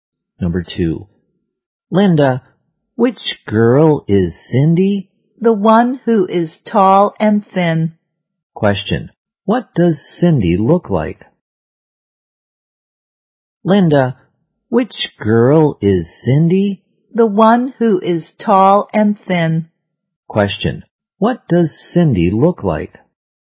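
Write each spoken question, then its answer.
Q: What does Cindy look like?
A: Tall and thin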